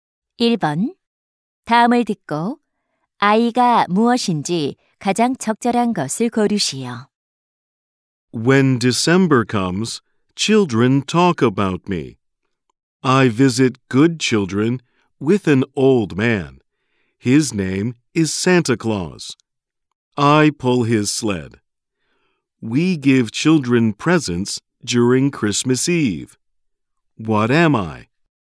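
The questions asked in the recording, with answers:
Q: 다음을 듣고 아이가 무엇인지 가장 적절한 것을 고르시오.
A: 순록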